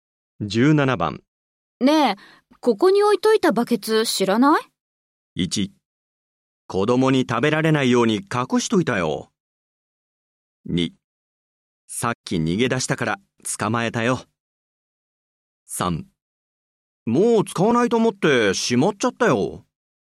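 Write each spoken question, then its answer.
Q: ねえ、ここに置いといたバケツ知らない?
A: 3: もう使わないと思ってしまっちゃったよ。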